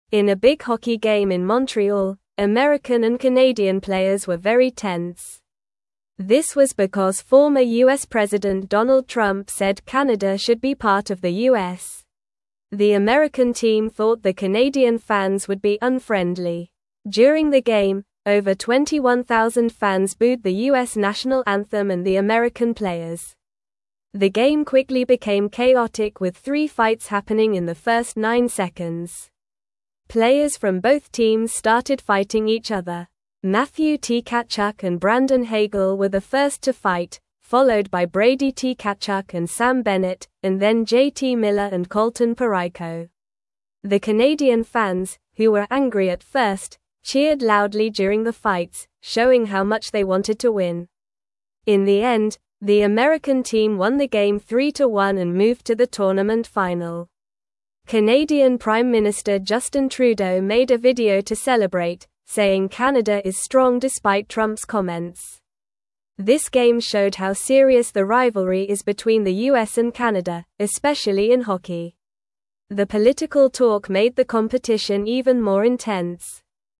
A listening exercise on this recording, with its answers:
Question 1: In a big hockey (1)______ in Montreal, American and Canadian players were very tense.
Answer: game

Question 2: This was because former U.S. President (2)______ Trump said Canada should be part of the U.S.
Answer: Donald

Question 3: The American (3)______ thought the Canadian fans would be unfriendly.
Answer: team

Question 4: The game quickly became chaotic with three fights (4)______ in the first nine seconds.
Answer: happening

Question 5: Players from both (5)______ started fighting each other.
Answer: teams

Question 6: (6)______ Tkachuk and Brandon Hagel were the first to fight,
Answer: Matthew

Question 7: followed by Brady (7)______ and Sam Bennett,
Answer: Tkachuk

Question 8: and then J.T. (8)______ and (9)______ Parayko.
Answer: Miller

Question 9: and then J.T. (8)______ and (9)______ Parayko.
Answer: Colton

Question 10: Canadian (10)______ Minister (11)______ Trudeau made a video to (12)______, saying Canada is strong despite Trump's comments.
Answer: Prime

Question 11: Canadian (10)______ Minister (11)______ Trudeau made a video to (12)______, saying Canada is strong despite Trump's comments.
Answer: Justin

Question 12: Canadian (10)______ Minister (11)______ Trudeau made a video to (12)______, saying Canada is strong despite Trump's comments.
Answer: celebrate

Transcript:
In a big hockey game in Montreal, American and Canadian players were very tense. This was because former U.S. President Donald Trump said Canada should be part of the U.S. The American team thought the Canadian fans would be unfriendly. During the game, over 21,000 fans booed the U.S. national anthem and the American players.
The game quickly became chaotic with three fights happening in the first nine seconds. Players from both teams started fighting each other. Matthew Tkachuk and Brandon Hagel were the first to fight, followed by Brady Tkachuk and Sam Bennett, and then J.T. Miller and Colton Parayko. The Canadian fans, who were angry at first, cheered loudly during the fights, showing how much they wanted to win.
In the end, the American team won the game 3-1 and moved to the tournament final. Canadian Prime Minister Justin Trudeau made a video to celebrate, saying Canada is strong despite Trump's comments. This game showed how serious the rivalry is between the U.S. and Canada, especially in hockey. The political talk made the competition even more intense.

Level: Level 2